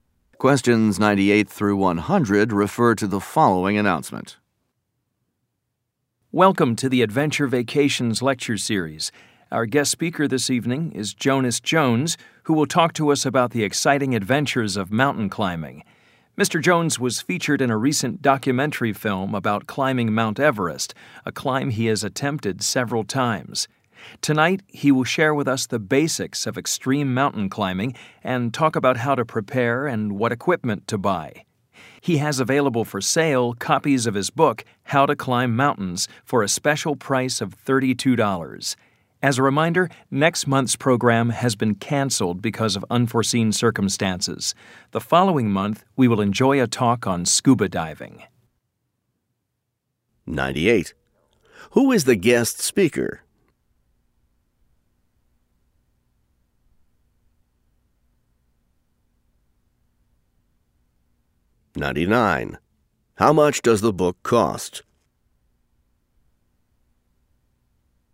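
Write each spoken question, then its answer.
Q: Who is the guest speaker?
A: Jonas Jones, a mountain climber

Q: How much does the book cost?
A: $32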